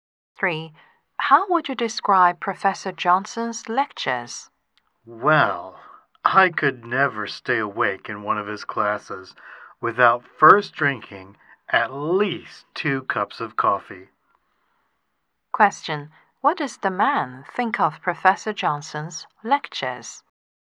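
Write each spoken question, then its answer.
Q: What does the man think of Professor Johnson's lectures?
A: They are boring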